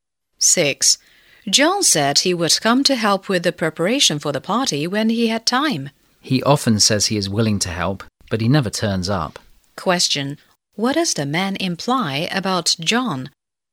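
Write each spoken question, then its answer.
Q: What does the man imply about John?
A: John doesn't keep his word; he never turns up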